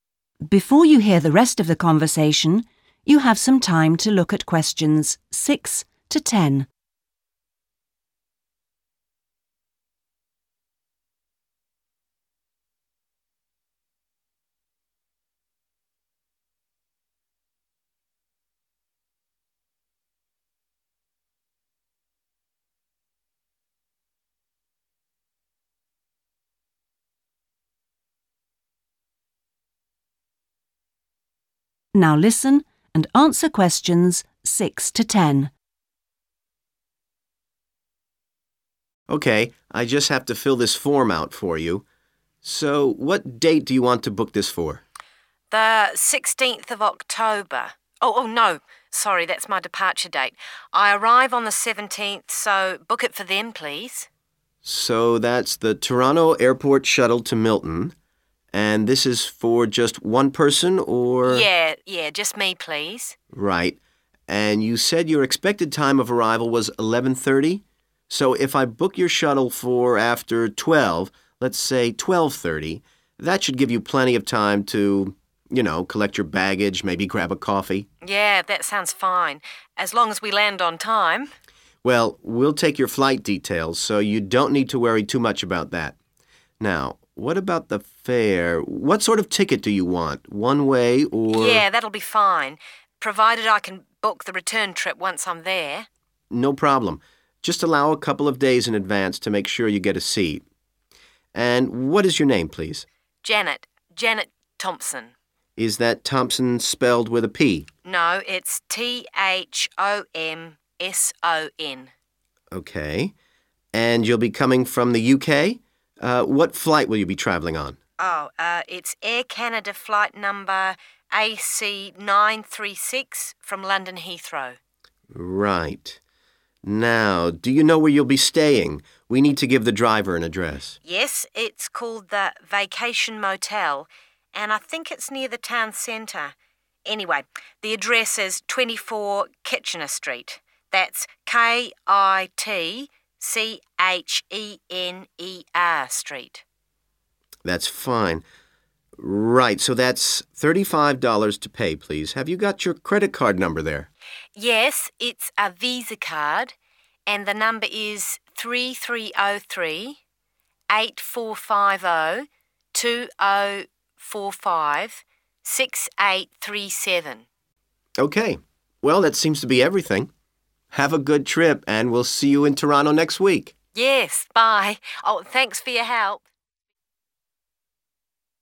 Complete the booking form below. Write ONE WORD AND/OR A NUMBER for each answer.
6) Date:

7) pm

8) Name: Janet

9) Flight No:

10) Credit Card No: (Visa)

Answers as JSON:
{"6": "17th October / 17 October / October 17th / October 17", "7": "12.30 / 12:30", "8": "Thomson", "9": "AC 936", "10": "3303 8450 2045 6837"}

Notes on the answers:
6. The correct answer is 17th October because the woman clarifies her schedule during the conversation. Although she mentions the 16th first, she explains that it is the day she leaves home (her departure date). She explicitly tells the staff member that she 'arrives' on the 17th and wants to book the travel for that time.
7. The correct answer is 12.30 because the man suggesting the booking specifically recommends this time. The woman arrives at 11:30, and the man suggests booking a bus for one hour later (12:30) so she has enough time to get her bags and a coffee. The woman agrees with this plan by saying it 'sounds fine'.
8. The correct answer is Thomson because when the man asks the woman for her name, she says her last name is Thomson. She then specifically spells it letter-by-letter to confirm there is no letter 'p' in it.
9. The correct answer is found when the man asks for the woman's flight details. She provides the name of the airline, Air Canada, and the exact flight code or flight number, which is AC936. This information is needed to complete the booking form for her transportation from the airport.
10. The correct answer is this specific long number because the woman gives it to the travel worker at the end of their conversation. When the man asks for her credit card info to pay the $35 fee, she identifies her card as a 'VISA card' and provides the 'number' so he can complete the booking.

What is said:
MAN: Sure.
MAN: OK, I just have to fill this form out for you. So what date do you want to book this for?
WOMAN: The 16th of October - oh, no, sorry, that's my departure date. I arrive on the 17th, so book it for then, please.
MAN: So, that's the Toronto Airport Shuttle to Milton. And this is for just one person or ...?
WOMAN: Yes, just me, please.
MAN: Right. And you said your expected time of arrival was 11.30? So if I book your Shuttle for after 12.00 - let's say, 12.30: that should give you plenty of time to, you know, collect your baggage, maybe grab a coffee?
WOMAN: Yeah, that sounds fine, as long as we land on time!
MAN: Well, we'll take your flight details so you don't need to worry too much about that. Now, what about the fare? What sort of ticket do you want? One way or ...?
WOMAN: Yes, that'll be fine, provided I can book the return trip once I'm there.
MAN: No problem - just allow a couple of days in advance to make sure you get a seat. And what's your name, please?
WOMAN: Janet, Janet Thomson.
MAN: Is that Thompson spelt with a 'p'?
WOMAN: No, it's T-H-O-M-S-O-N.
And you'll be coming from the UK? What flight will you be travelling on?
WOMAN: Oh, it's Air Canada flight number AC936, from London Heathrow.
MAN: Right. Now, do you know where you'll be staying? We need to give the driver an address.
WOMAN: Yes, it's called the Vacation Motel - and I think it's near the town centre. Anyway, the address is 24, Kitchener Street - that's KITCHENER Street.
MAN: That's fine. Right, so that's $35 to pay please. Have you got your credit card number there?
WOMAN: Yes, it's a VISA card, and the number is 3303 8450 2045 6837.
Well, that seems to be everything. Have a good trip and we'll see you in Toronto next week!
WOMAN: Yes, bye - oh, thanks for your help!